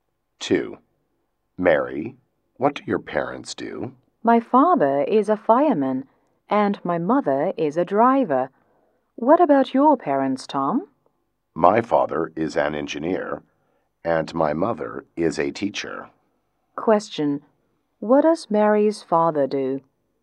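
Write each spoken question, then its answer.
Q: What does Mary's father do?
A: He is a fireman.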